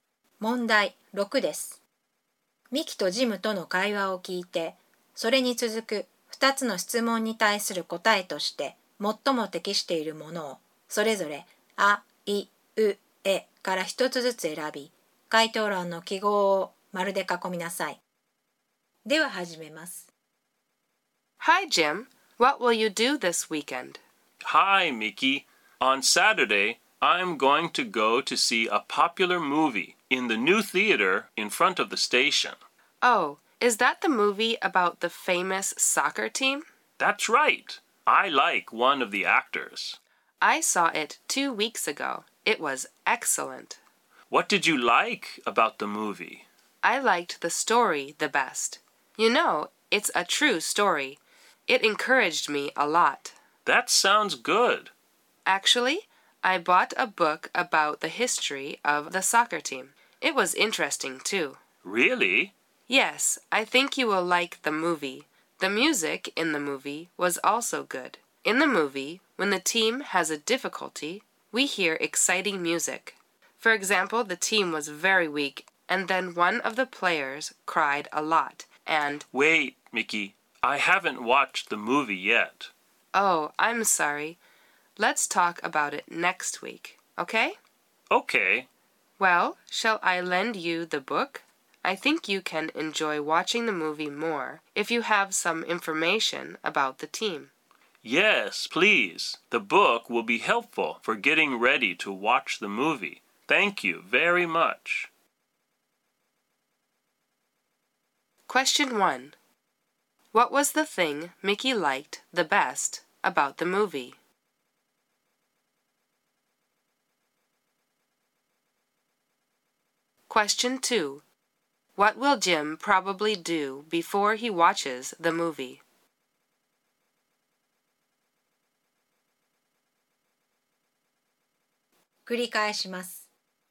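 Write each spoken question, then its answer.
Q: What was the thing Miki liked the best about the movie?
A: The story

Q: What will Jim probably do before he watches the movie?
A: Read the book about the history of the soccer team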